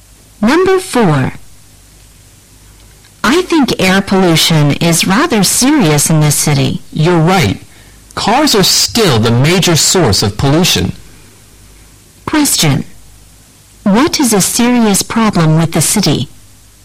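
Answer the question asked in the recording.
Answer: Air pollution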